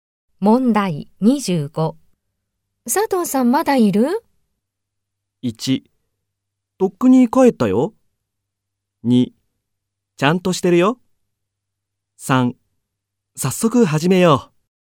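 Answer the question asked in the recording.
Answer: 1: とっくに帰ったよ。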